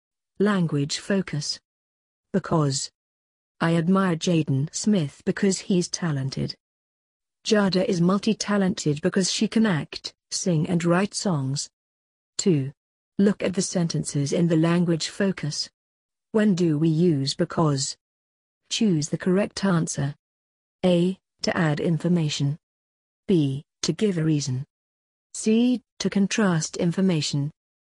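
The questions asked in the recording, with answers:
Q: When do we use because? Choose the correct answer.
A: B: To give a reason.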